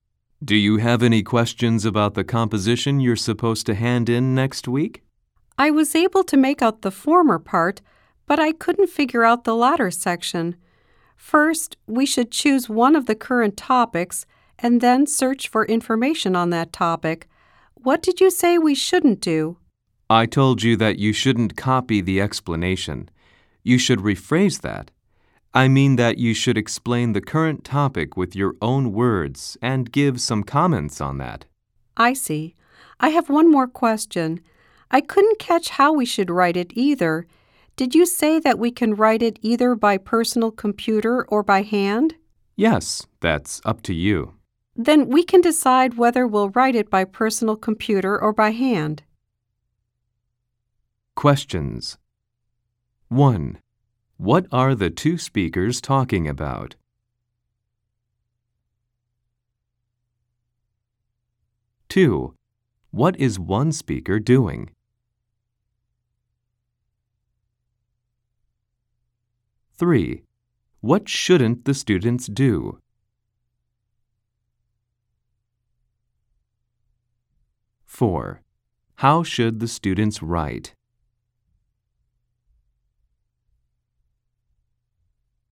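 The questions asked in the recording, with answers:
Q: What are the two speakers talking about?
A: The composition due next week

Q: What shouldn't the students do?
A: Copy the explanation

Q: How should the students write?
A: By personal computer or by hand, as they choose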